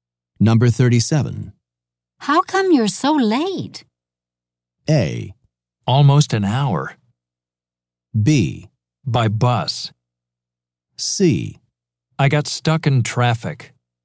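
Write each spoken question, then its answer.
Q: How come you're so late?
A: C: I got stuck in traffic.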